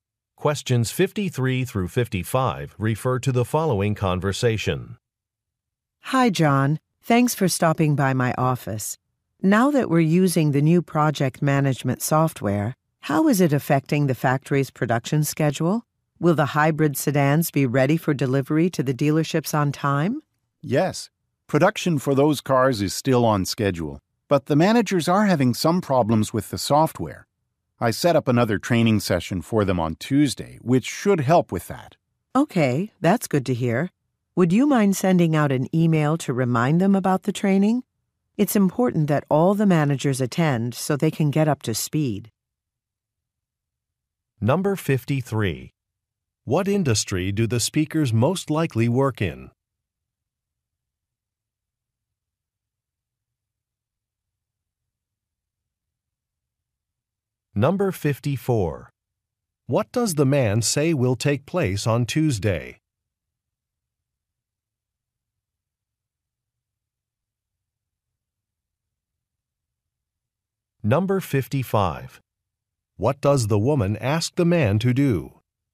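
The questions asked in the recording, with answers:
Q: What industry do the speakers most likely work in?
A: Car manufacturing

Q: What does the man say will take place on Tuesday?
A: A training session

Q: What does the woman ask the man to do?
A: Send a reminder email about the training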